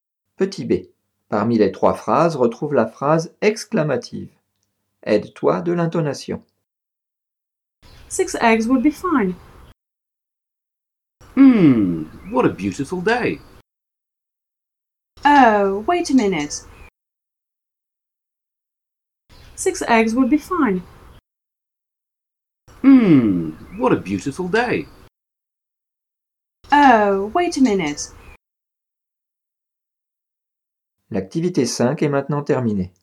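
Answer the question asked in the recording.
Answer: What a beautiful day.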